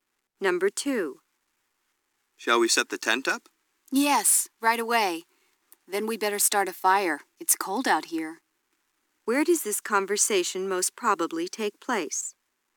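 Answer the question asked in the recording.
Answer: At a campsite outdoors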